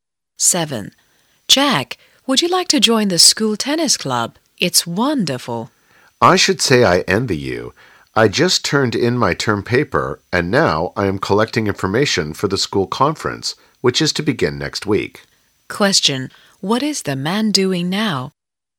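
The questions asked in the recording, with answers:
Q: What is the man doing now?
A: Collecting information for the school conference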